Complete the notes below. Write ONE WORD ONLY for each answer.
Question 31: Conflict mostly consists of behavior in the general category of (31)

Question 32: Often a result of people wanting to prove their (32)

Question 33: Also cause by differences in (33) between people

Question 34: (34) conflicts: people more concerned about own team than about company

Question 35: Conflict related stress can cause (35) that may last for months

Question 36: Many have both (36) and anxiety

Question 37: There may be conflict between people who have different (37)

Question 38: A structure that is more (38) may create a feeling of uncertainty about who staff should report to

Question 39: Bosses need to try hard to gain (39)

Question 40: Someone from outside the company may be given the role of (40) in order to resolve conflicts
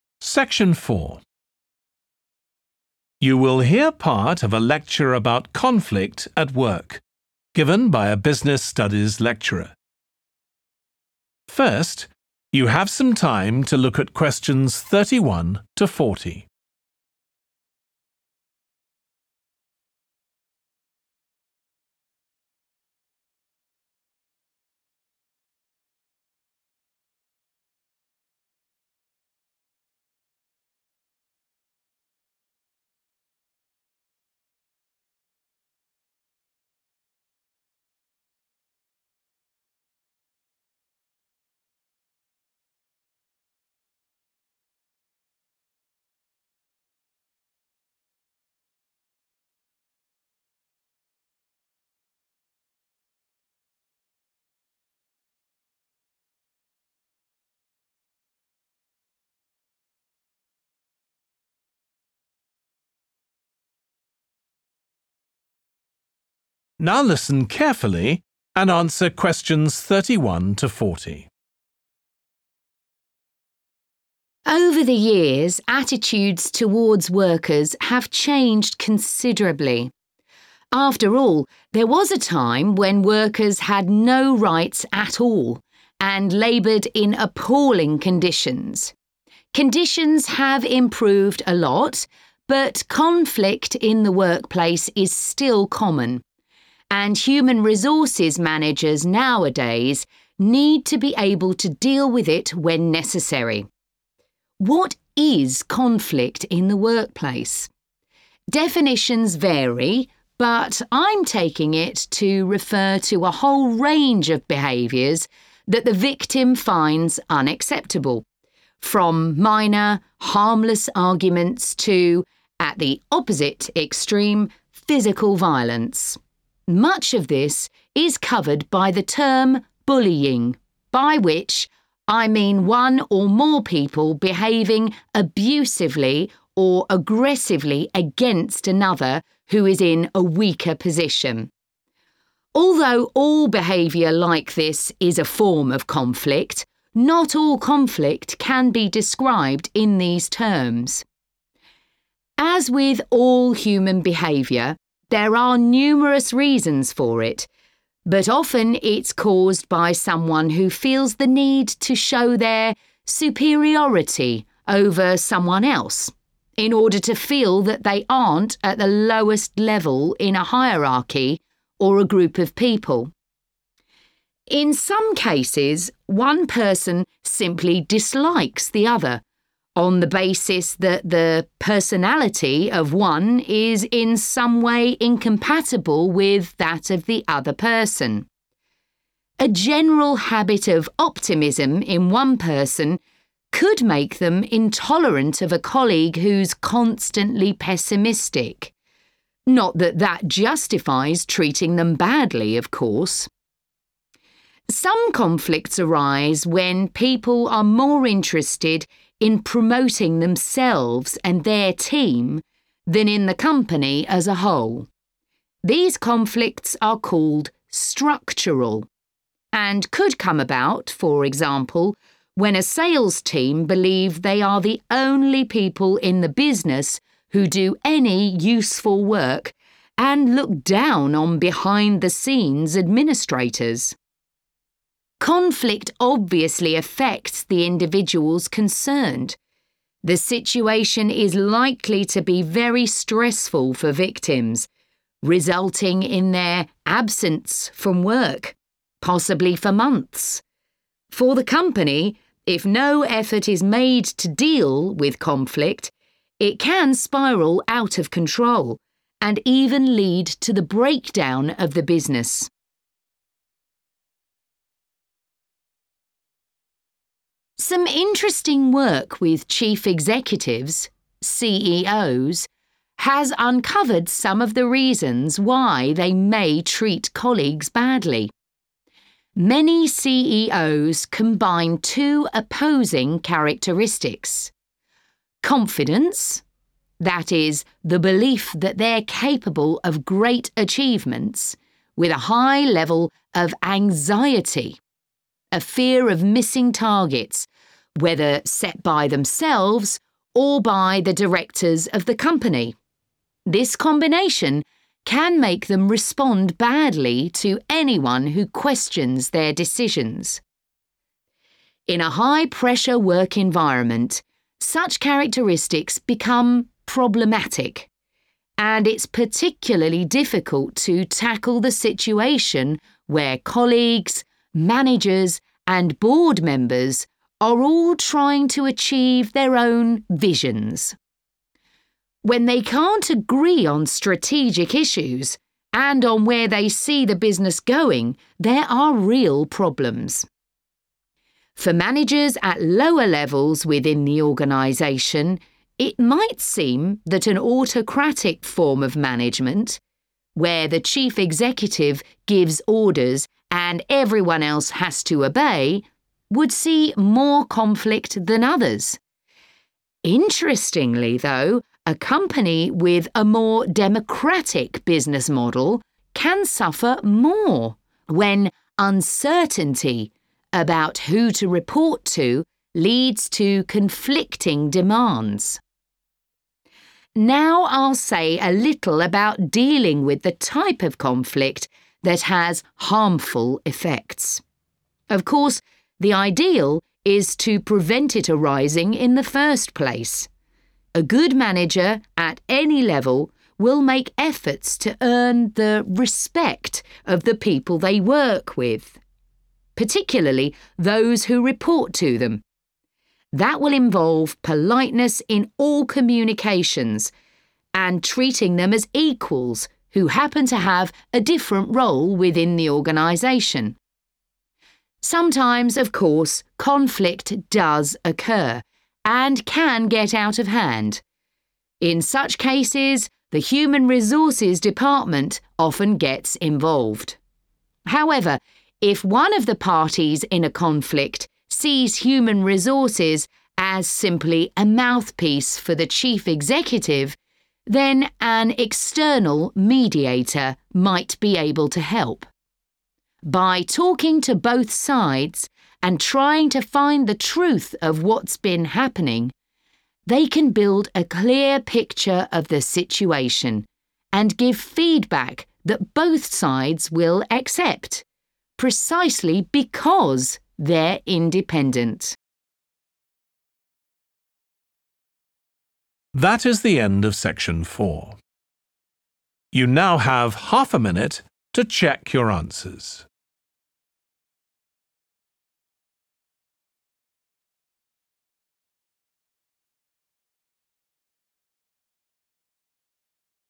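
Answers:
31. bullying
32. superiority
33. personality
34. structural
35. absence
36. confidence
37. visions
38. democratic
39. respect
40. mediator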